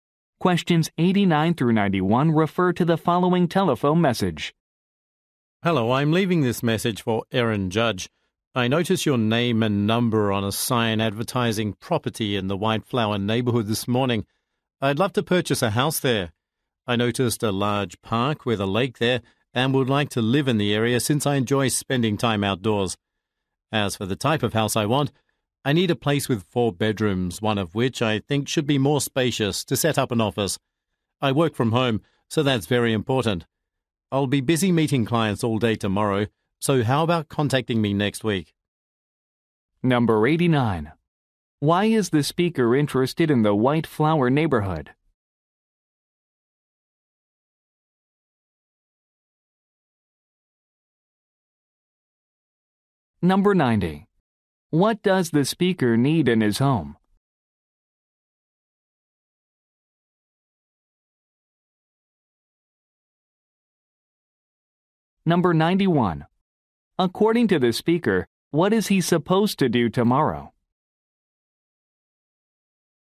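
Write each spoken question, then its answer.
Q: Why is the speaker interested in the White Flower neighborhood?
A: It has a park with a lake and he enjoys the outdoors

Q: What does the speaker need in his home?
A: Four bedrooms, one spacious enough for an office

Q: According to the speaker, what is he supposed to do tomorrow?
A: Meet clients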